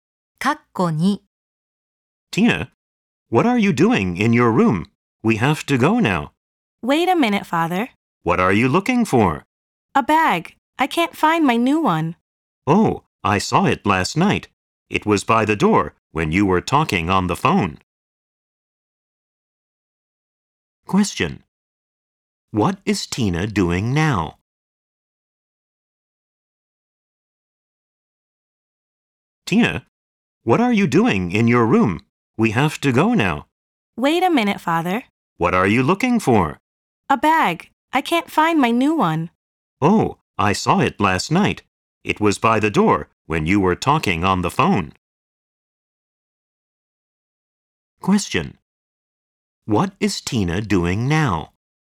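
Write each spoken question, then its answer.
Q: What is Tina doing now?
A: She is looking for her new bag.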